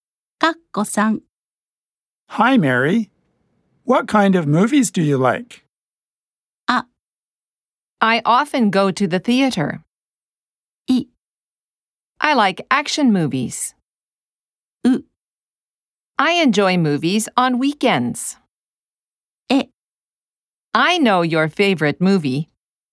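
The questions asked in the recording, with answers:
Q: What kind of movies do you like?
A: い: I like action movies.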